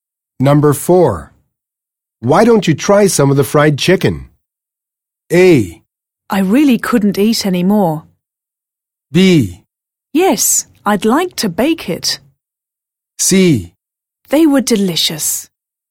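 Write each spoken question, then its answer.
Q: Why don't you try some of the fried chicken?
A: A: I really couldn't eat any more.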